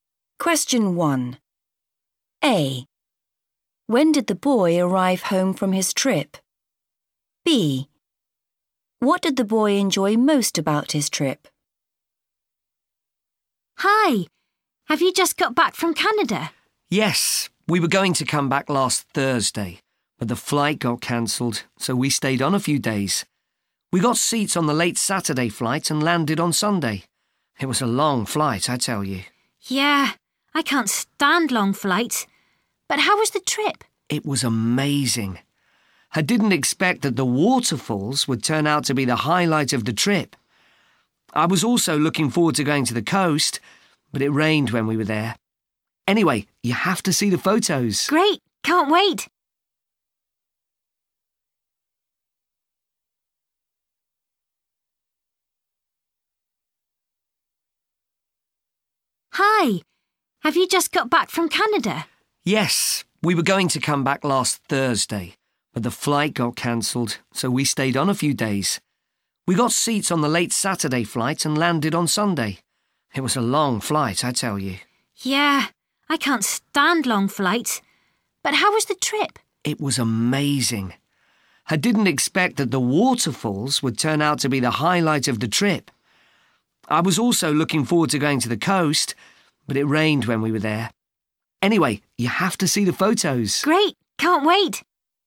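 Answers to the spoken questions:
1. On Sunday
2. The waterfalls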